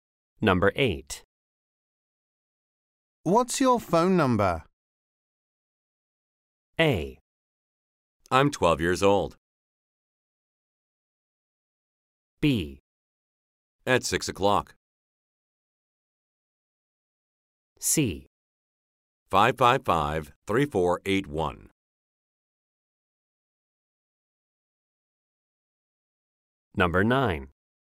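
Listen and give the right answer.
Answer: C: 555-3481.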